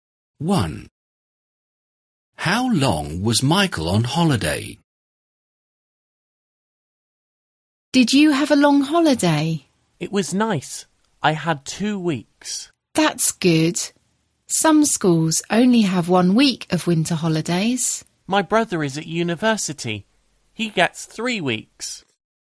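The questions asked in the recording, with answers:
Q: How long was Michael on holiday?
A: 2 weeks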